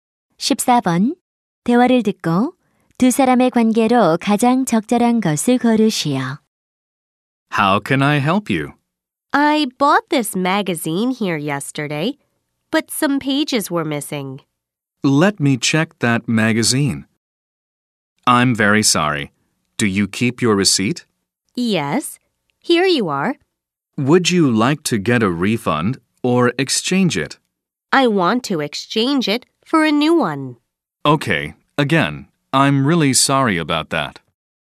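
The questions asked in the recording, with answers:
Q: 대화를 듣고 두 사람의 관계로 가장 적절한 것을 고르시오.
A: 점원과 손님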